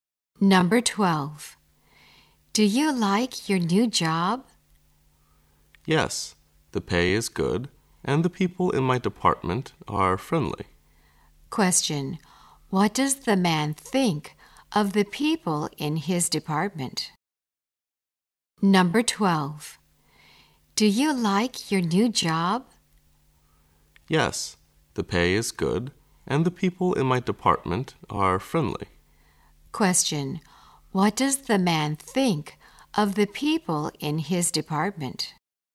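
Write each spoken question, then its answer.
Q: what does the man think of the people in his department?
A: They are friendly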